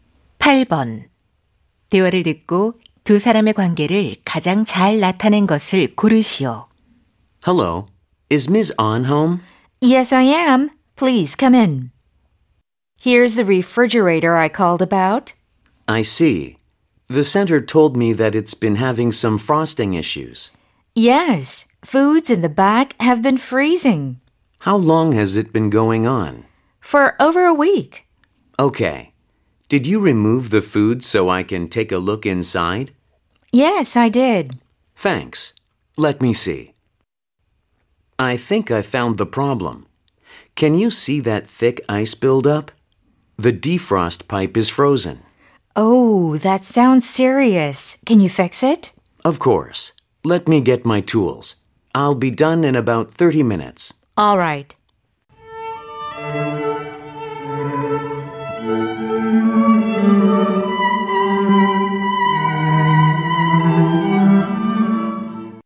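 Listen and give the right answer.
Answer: 고객 – 냉장고 수리 기사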